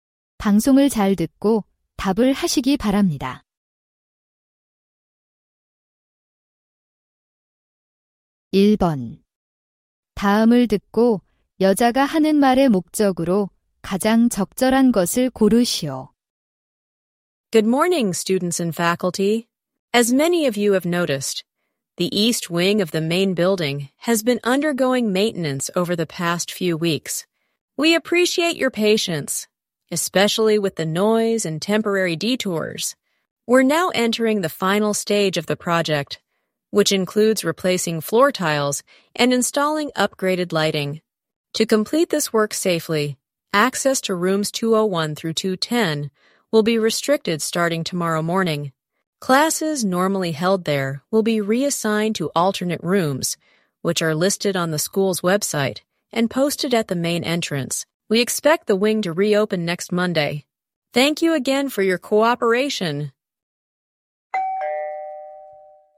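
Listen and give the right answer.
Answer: 본관 동관 공사로 201~210호 출입이 제한되고 수업 장소가 변경됨을 알리려고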